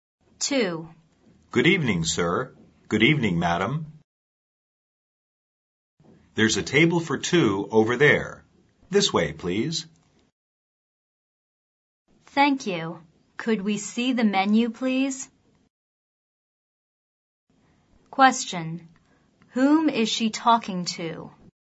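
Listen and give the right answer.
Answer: A waiter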